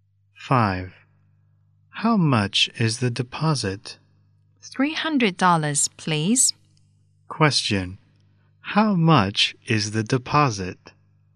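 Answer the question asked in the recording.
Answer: $300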